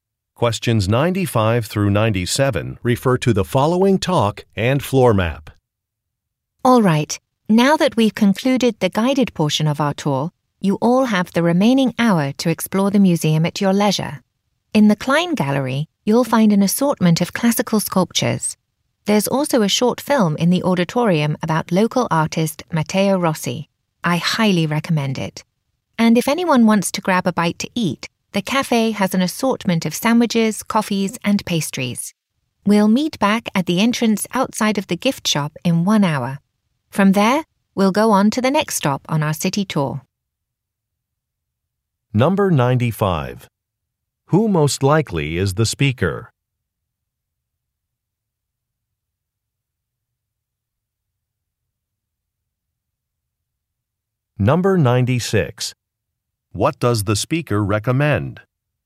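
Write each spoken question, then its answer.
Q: Who most likely is the speaker?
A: A tour guide

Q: What does the speaker recommend?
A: Watching the short film about local artist Matteo Rossi in the auditorium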